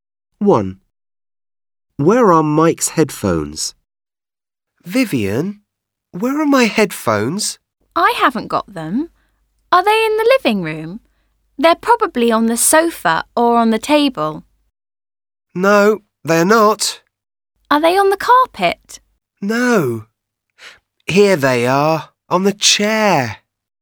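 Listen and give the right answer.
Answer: On the chair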